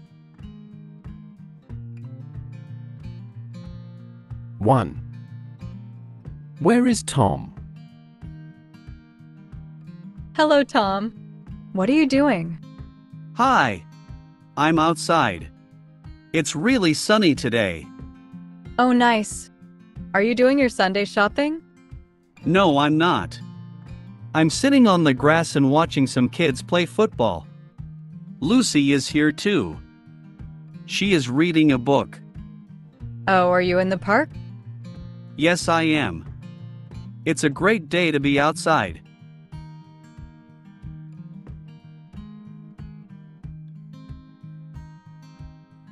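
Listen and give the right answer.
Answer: In the park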